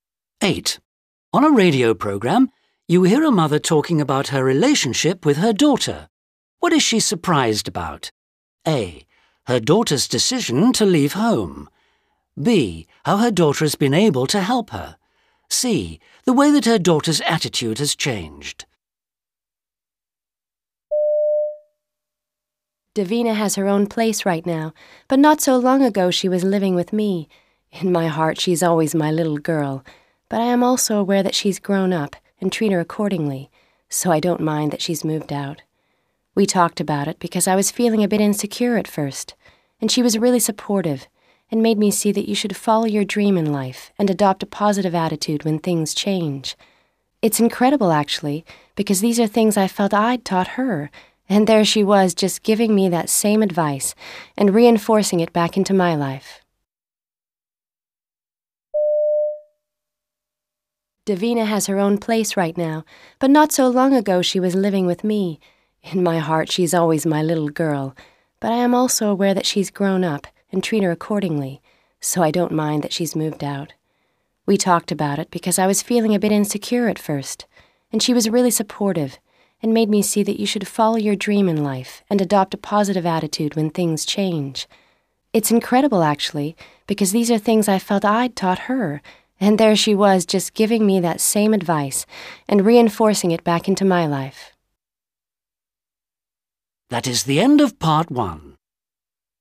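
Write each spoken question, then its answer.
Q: What is she surprised about?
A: B: How her daughter has been able to help her.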